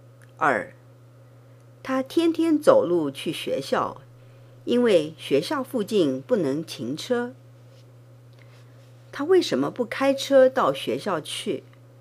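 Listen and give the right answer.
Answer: 因为学校附近不能停车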